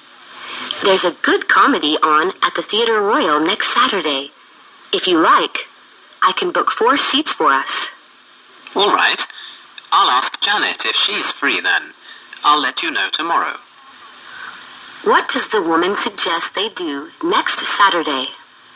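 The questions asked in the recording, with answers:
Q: What does the woman suggest they do next Saturday?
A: Go to see a comedy at the Theatre Royal.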